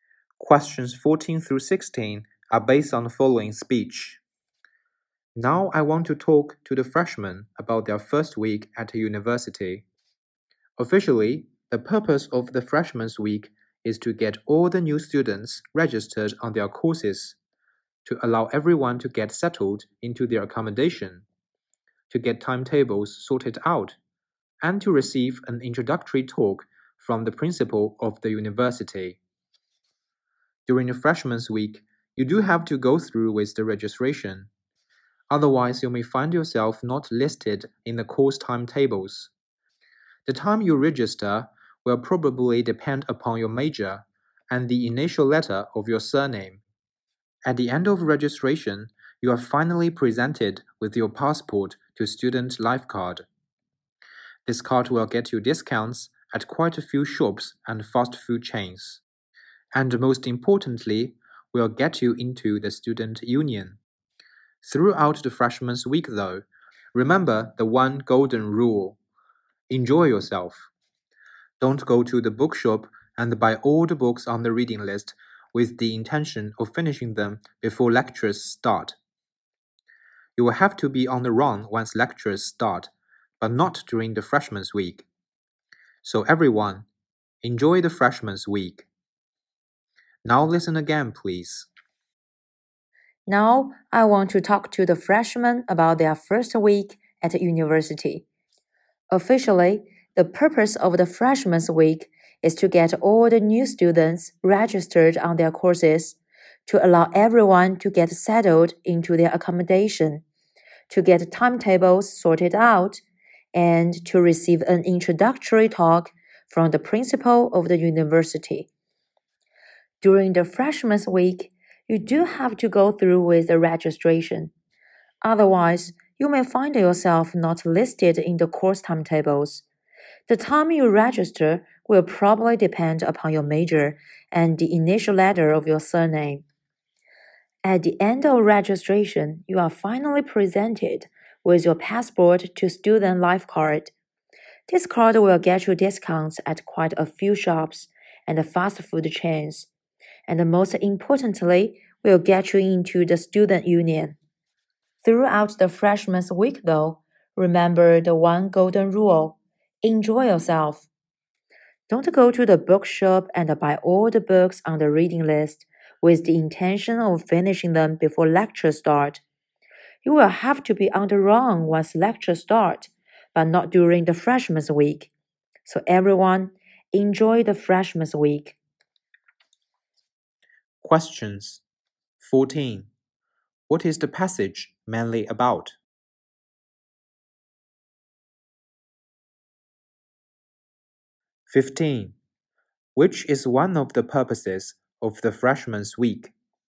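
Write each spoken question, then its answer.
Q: What is the passage mainly about?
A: Freshmen's first week at university

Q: Which is one of the purposes of the freshman's week?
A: To get new students registered on their courses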